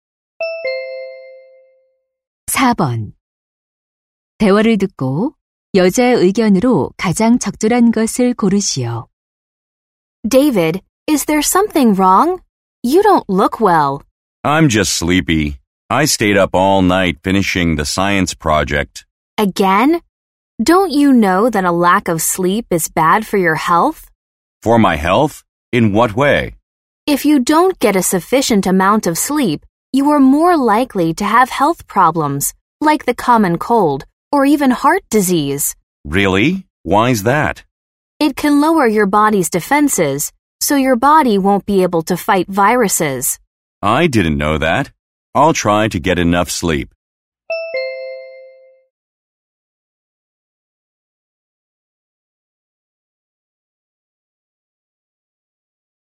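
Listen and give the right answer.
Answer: 수면 부족은 건강에 해롭다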